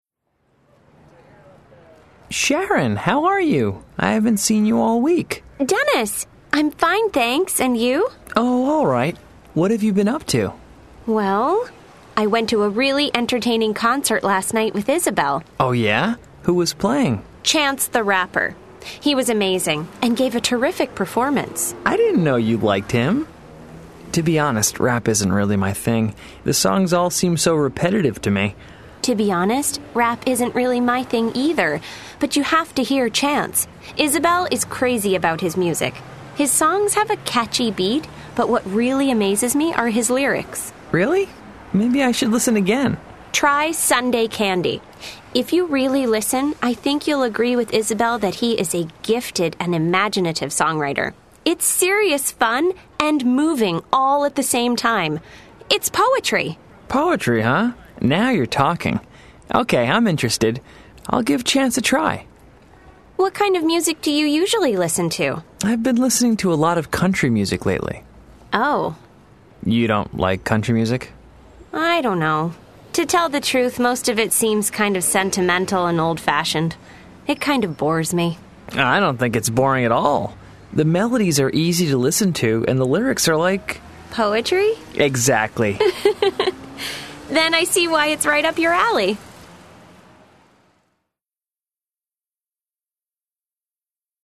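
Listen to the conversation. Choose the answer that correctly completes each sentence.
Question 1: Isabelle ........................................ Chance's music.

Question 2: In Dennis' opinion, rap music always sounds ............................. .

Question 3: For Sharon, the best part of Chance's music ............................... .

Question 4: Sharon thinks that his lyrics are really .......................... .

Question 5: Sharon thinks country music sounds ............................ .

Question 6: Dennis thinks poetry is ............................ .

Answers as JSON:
{"1": "is crazy about", "2": "repetitive", "3": "is his lyrics", "4": "gifted and imaginative; poetry", "5": "easy to listen to", "6": "interesting"}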